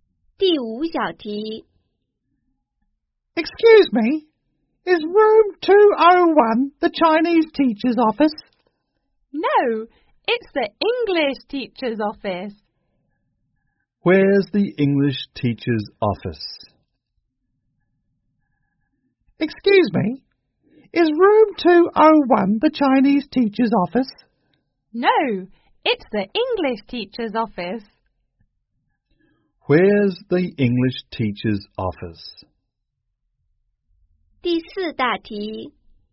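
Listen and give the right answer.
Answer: Room 201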